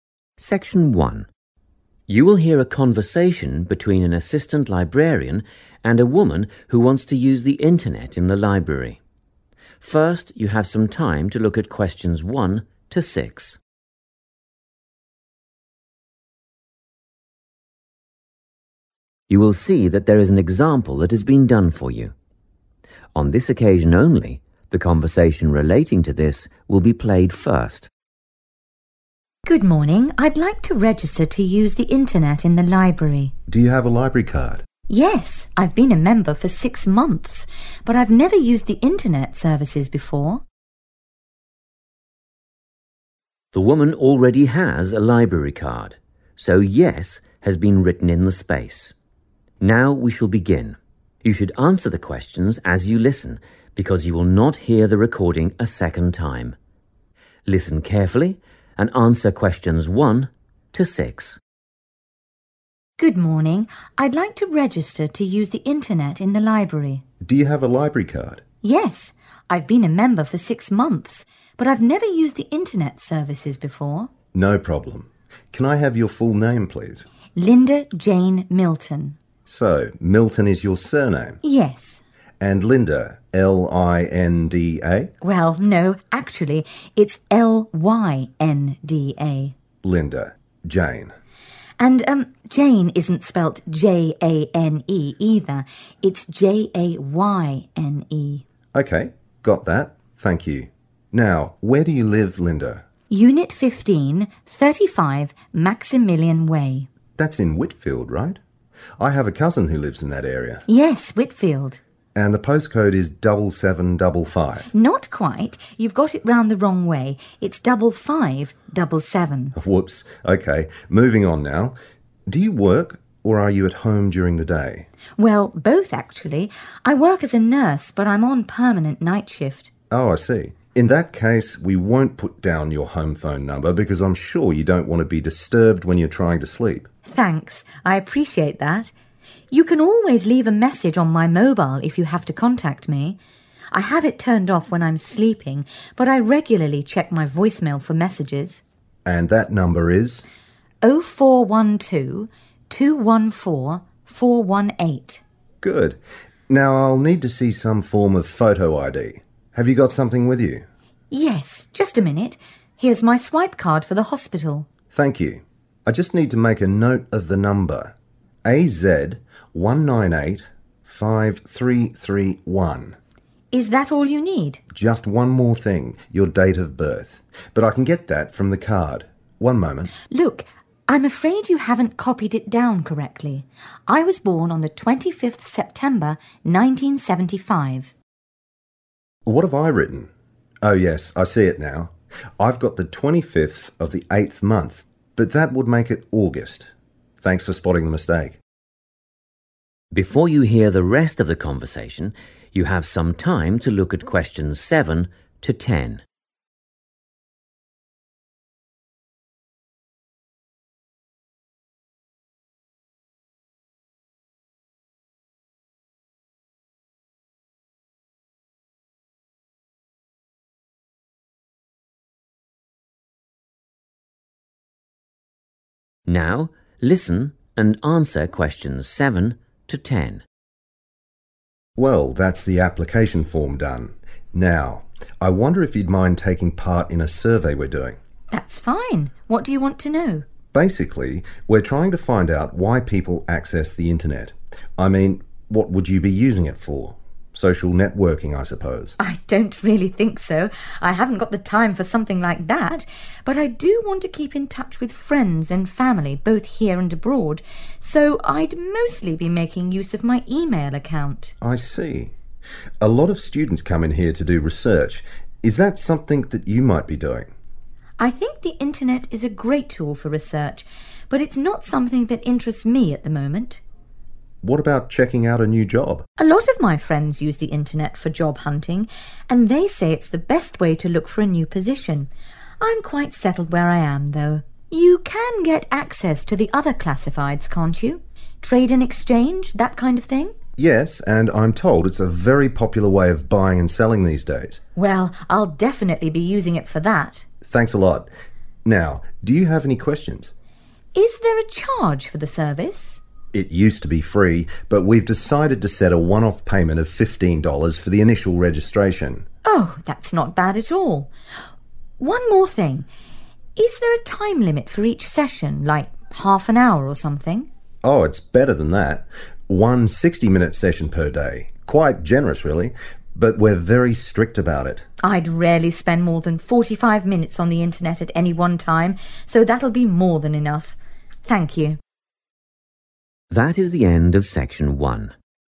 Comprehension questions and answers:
Complete the form below. Write NO MORE THAN TWO WORDS AND/OR A NUMBER for each answer.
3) Post Code:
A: 5577

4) (works the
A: night shift

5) Type of ID:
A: swipe card

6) Date of Birth: 25th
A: September 1975 / Sept 1975

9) How much does it cost to register as an internet user?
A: fifteen dollars / $15 / 15 dollars

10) What is the maximum amount of time allowed per single daily internet session?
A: 60 minutes / sixty minutes / one hour / 1 hour

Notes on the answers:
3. The correct answer is 5577 because when the man suggests the postcode is 'double seven double five' (7755), the woman corrects him. She says the numbers are in the wrong order and tells him it is actually 'double five double seven'. In English, 'double' means two of the same number, so 'double five double seven' is 5577.
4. The correct answer is determined by the woman's response to the librarian's question about her daily activities. When asked if she works during the day, she explains that while she is a nurse, she specifically works the 'night shift.' Because she works at night, she sleeps during the day, which is why they decide not to list her home phone number.
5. The correct answer is confirmed when the librarian asks for a 'photo ID'. In response, the woman offers her hospital identification. She describes this item using the specific term 'swipe card', which the librarian then uses to record her ID number.
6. The correct answer is September 1975 because the woman clearly states this date when she corrects the librarian's mistake. The librarian thought she was born in August (the 8th month), but she clarifies her birth month is September (the 9th month) and her birth year is 1975.
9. The correct answer is identified when the librarian explains that the library now requires a 'one-off payment' (a single payment made once) for 'initial registration' (the first time you sign up). He explicitly mentions the amount is 'fifteen dollars'.
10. The correct answer is 60 minutes because the man (the assistant librarian) explains the rules for internet use. When the woman asks about a time limit, he clarifies that users are allowed one session per day that lasts for 60 minutes.

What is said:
Section 1
You will hear a conversation between an assistant librarian and a woman who wants to use the internet in the library. First, you have some time to look at questions 1 to 6.
You will see that there is an example that has been done for you. On this occasion only the conversation relating to this will be played first.
WOMAN: Good morning, I'd like to register to use the internet in the library.
MAN: Do you have a library card?
WOMAN: Yes, I've been a member for 6 months but I've never used the internet services before.
The woman already has a library card, so Yes has been written in the space. Now we shall begin. You should answer the questions as you listen because you will not hear the recording a second time. Listen carefully and answer questions 1 to 6.
MAN: No problem. Can I have your full name please?
MAN: So, Milton is your surname?
WOMAN: Yes.
MAN: And Linda, L-i-n-d-a?
WOMAN: Well, no, actually it's L-Y-N-D-A.
WOMAN: And, erm, Jane isn't spelt J-a-n-e either. It's J-A-Y-N-E.
MAN: Okay, got that ...thank you. Now, where do you live, Lynda?
WOMAN: Unit 15, 35 Maximilian Way.
MAN: That's in Whitfield, right? I have a cousin who lives in that area.
WOMAN: Yes, Whitfield.
MAN: And the postcode is double seven double five?
WOMAN: Not quite – you've got it round the wrong way.
MAN: Whoops, okay, moving on now ... Do you work or are you at home during the day?
WOMAN: Well, both, actually. I work as a nurse but I'm on permanent night shift.
MAN: Oh, I see. In that case, we won't put down your home phone number because I'm sure you don't want to be disturbed when you're trying to sleep.
WOMAN: Thanks, I appreciate that – you can always leave a message on my mobile if you have to contact me. I have it turned off when I'm sleeping, but I regularly check my voicemail for messages.
MAN: And that number is?
WOMAN: 0412 214 418
MAN: Good. Now I'll need to see some form of photo ID – have you got something with you?
WOMAN: Yes, just a minute, here's my swipe card for the hospital.
MAN: Thank you. I just need to make a note of the number ... AZ 1985331
WOMAN: Is that all you need?
MAN: Just one more thing – your date of birth – but I can get that from the card. One moment ...
WOMAN: Look – I'm afraid you haven't copied it down correctly. I was born on the 25th September, 1975.
MAN: What have I written? Oh yes, I see it now, I've got the 25th of the eighth month, but that would make it August ... Thanks for spotting the mistake.
Before you hear the rest of the conversation, you have some time to look at questions 7 to 10.
Now listen and answer questions 7 to 10.
MAN: Well, that's the application form done – now, I wonder if you'd mind taking part in a survey we're doing?
WOMAN: That's fine. What do you want to know?
MAN: Basically, we're trying to find out why people access the internet. I mean, what would you be using it for? Social networking, I suppose.
WOMAN: I don't really think so – I haven't got the time for something like that. But I do want to keep in touch with friends and family both here and abroad, so I'd mostly be making use of my email account.
MAN: I see. A lot of students come in here to do research – is that something that you might be doing?
WOMAN: I think the internet is a great tool for research but it's not something that interests me at the moment.
MAN: What about checking out a new job?
WOMAN: A lot of my friends use the internet for job hunting and they say it's the best way to look for a new position – I'm quite settled where I am, though. You can get access to the other classifieds, can't you? Trade and exchange, that kind of thing ...
MAN: Yes, and I'm told it's a very popular way of buying and selling these days.
WOMAN: Well, I'll definitely be using it for that.
MAN: Thanks a lot. Now, do you have any questions?
WOMAN: Is there a charge for the service?
MAN: It used to be free but we've decided to set a one-off payment of fifteen dollars for the initial registration.
WOMAN: Oh, that's not bad at all. One more thing ... is there a time limit for each session, like half an hour or something?
MAN: Oh, it's better than that – one 60-minute session per day – quite generous really. But we're very strict about it.
WOMAN: I'd rarely spend more than 45 minutes on the internet at any one time so that'll be more than enough. Thank you.
That is the end of section 1. You now have half a minute to check your answers.